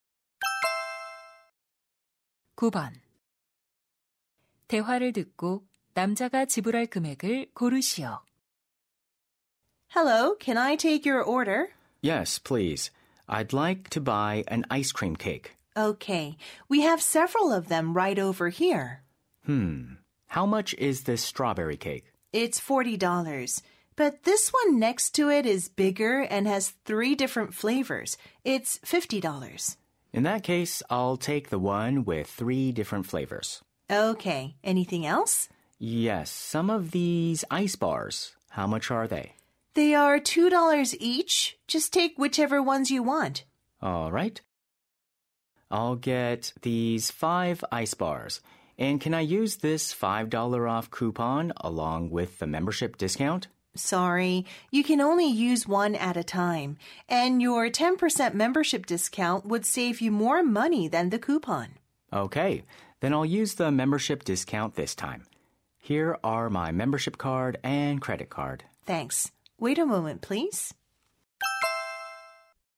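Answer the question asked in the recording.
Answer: $54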